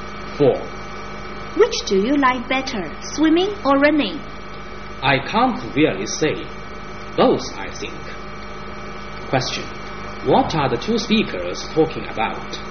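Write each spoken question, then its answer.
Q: What are the 2 speakers talking about?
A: Sports (swimming and running)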